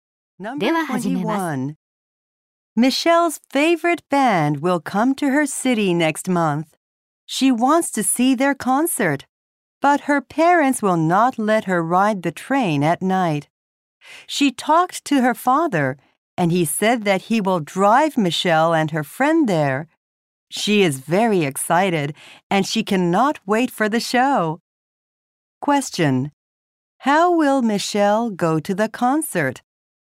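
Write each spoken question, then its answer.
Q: How will Michelle go to the concert?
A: Her father will drive her.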